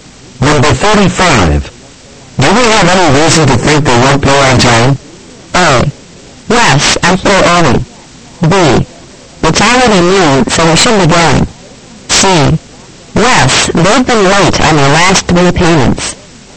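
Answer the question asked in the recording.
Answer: C: Yes, they've been late on their last three payments.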